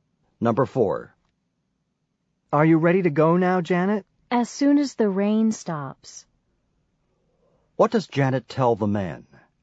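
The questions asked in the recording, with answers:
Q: What does Janet tell the man?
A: She will be ready to go when the rain stops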